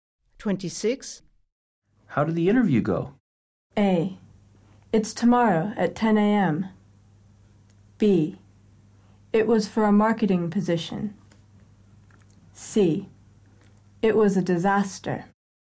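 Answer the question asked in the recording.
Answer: C: It was a disaster.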